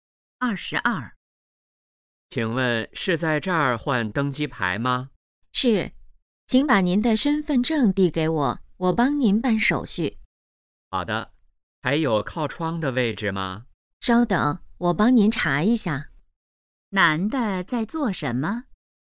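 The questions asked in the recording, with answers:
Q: 男的在做什么?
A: 换登机牌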